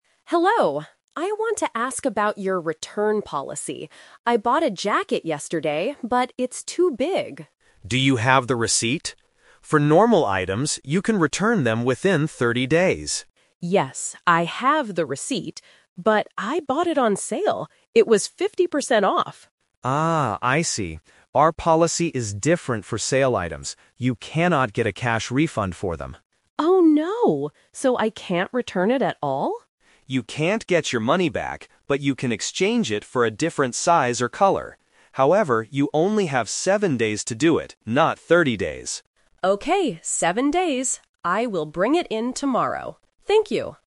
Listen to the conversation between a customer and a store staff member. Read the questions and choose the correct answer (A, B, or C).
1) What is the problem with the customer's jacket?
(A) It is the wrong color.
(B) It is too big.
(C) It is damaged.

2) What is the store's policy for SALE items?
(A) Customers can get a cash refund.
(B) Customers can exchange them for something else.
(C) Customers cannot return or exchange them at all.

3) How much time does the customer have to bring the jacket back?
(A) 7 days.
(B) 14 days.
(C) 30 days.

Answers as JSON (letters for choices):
{"1": "B", "2": "B", "3": "A"}

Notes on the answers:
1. The customer explicitly says, "I bought a jacket yesterday, but it's too big." Why the trap is wrong: Options (A) and (C) are common problems with clothes, but they are not mentioned as the issue for this specific jacket. (Color is mentioned later as an option for exchange, not as the problem).
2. The staff tells the customer, "...you can exchange it for a different size or color." Why the trap is wrong: Option (A) is a trap. The staff clearly states, "You cannot get a cash refund." Option (C) is the customer's misunderstanding ("So I can't return it at all?"), which the staff corrects.
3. This is the "Twist" / Numbers trap. The staff says, "However, you only have 7 days to do it..." Why the trap is wrong: Option (C) is a major trap. 30 days is the return period for normal items, but the jacket was a sale item. Option (B) is not mentioned.

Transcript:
Customer: Hello, I want to ask about your return policy. I bought a jacket yesterday, but it's too big.
Staff: Do you have the receipt? For normal items, you can return them within 30 days.
Customer: Yes, I have the receipt. But I bought it on sale. It was 50% off.
Staff: Ah, I see. Our policy is different for sale items. You cannot get a cash refund for them.
Customer: Oh no! So I can't return it at all?
Staff: You can't get your money back, but you can exchange it for a different size or color. However, you only have 7 days to do it, not 30 days.